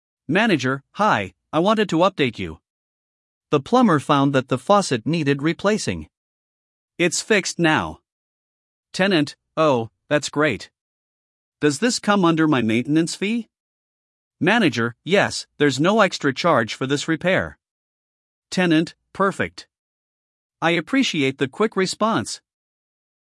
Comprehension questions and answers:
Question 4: What solution was provided to fix the problem?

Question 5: Who is responsible for the repair cost?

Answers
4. Faucet replaced
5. Covered under maintenance

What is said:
Manager: Hi, I wanted to update you. The plumber found that the faucet needed replacing. It's fixed now.
Tenant: Oh, that's great. Does this come under my maintenance fee?
Manager: Yes, there's no extra charge for this repair.
Tenant: Perfect. I appreciate the quick response!